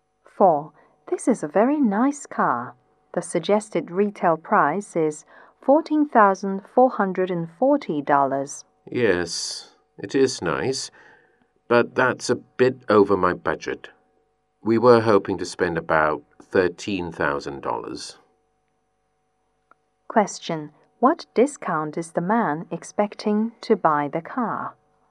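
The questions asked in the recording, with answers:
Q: What discount is the man expecting to buy the car?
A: About $1,440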